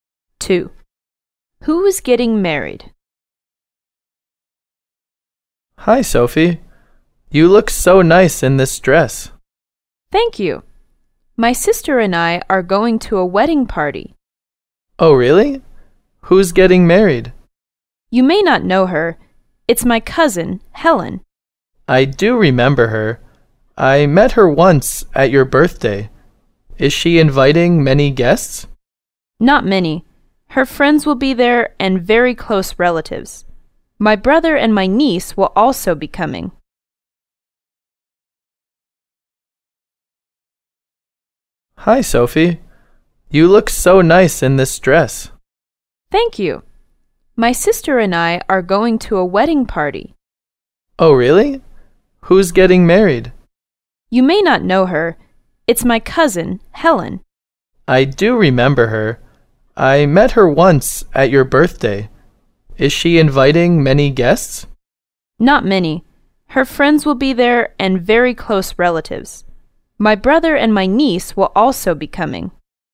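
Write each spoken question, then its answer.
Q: Who is getting married?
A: Sophie's cousin, Helen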